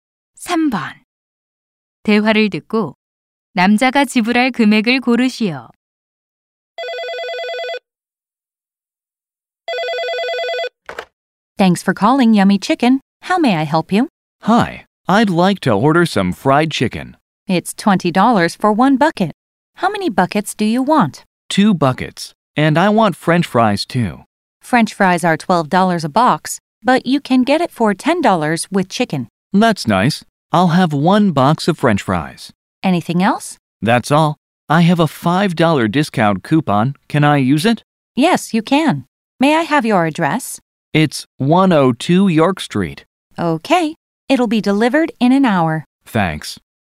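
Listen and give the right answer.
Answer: $45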